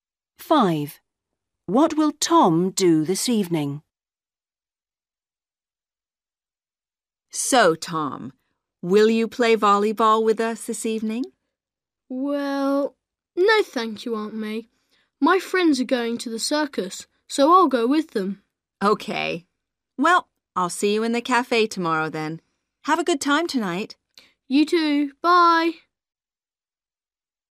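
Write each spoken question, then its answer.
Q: What will Tom do this evening?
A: Go to the circus with his friends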